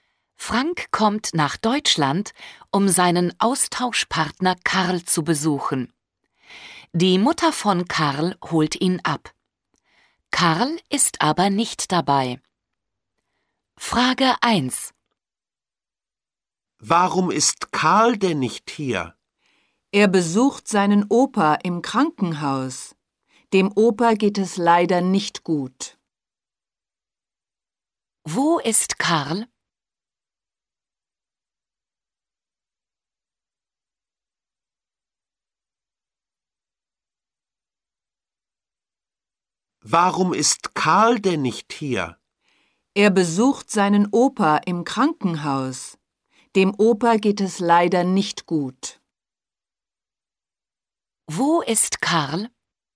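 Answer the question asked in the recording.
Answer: Im Krankenhaus (er besucht seinen Opa)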